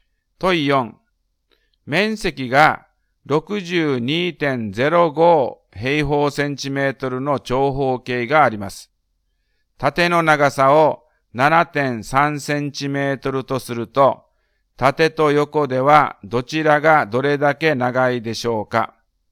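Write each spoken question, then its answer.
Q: 縦の長さを 7.3 センチメートルとすると、縦と横ではどちらがどれだけ長いでしょうか。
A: 横が1.2センチメートル長い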